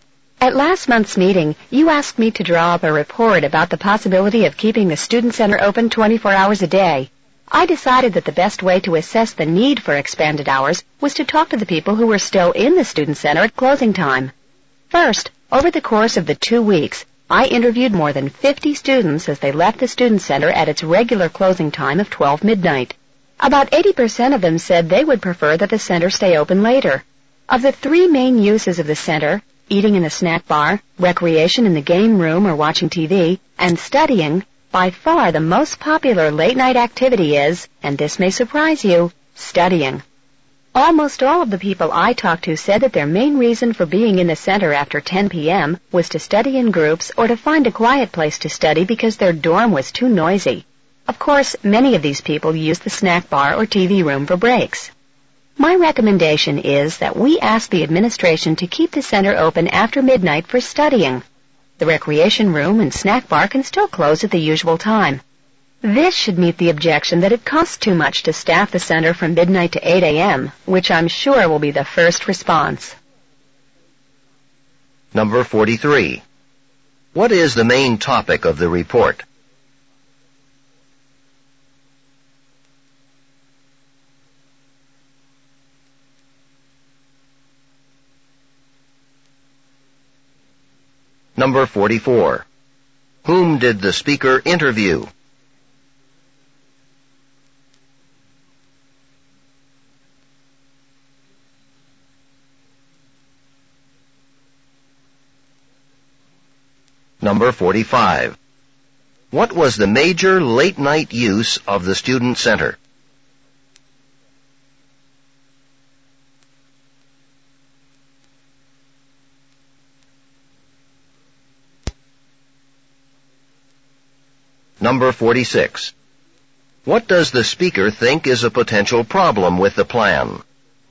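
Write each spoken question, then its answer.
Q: What is the main topic of the report?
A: Keeping the student center open 24 hours a day

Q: Whom did the speaker interview?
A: Students leaving the student center at closing time

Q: What was the major late-night use of the student center?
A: Studying

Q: What does the speaker think is a potential problem with the plan?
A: The cost of staffing the center from midnight to 8 a.m.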